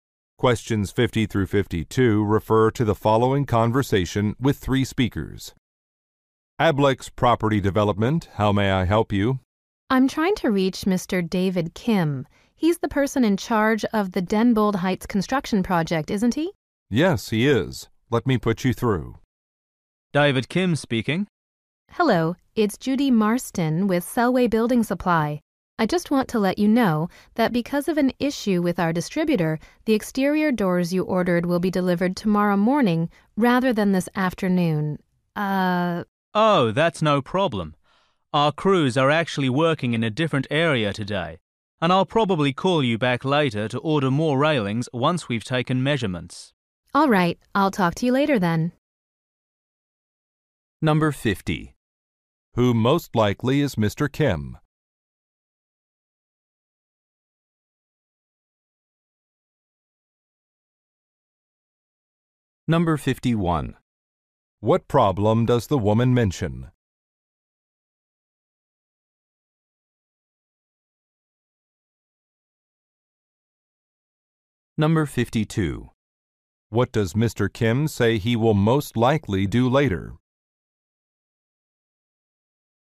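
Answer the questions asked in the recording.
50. A manager of a construction project
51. The door delivery is delayed until tomorrow
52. Call back to order more railings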